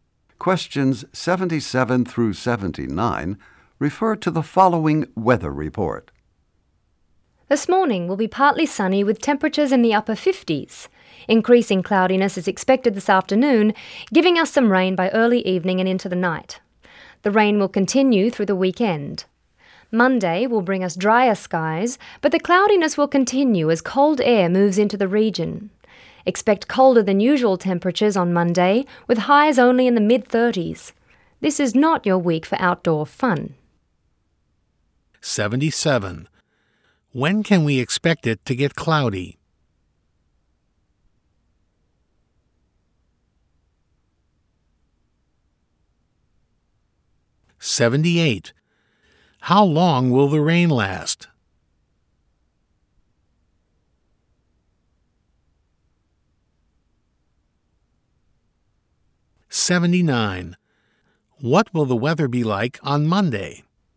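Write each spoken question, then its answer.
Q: When can we expect it to get cloudy?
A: This afternoon

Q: How long will the rain last?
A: Through the weekend

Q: What will the weather be like on Monday?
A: Dry, cloudy and colder than usual, highs in the mid-30s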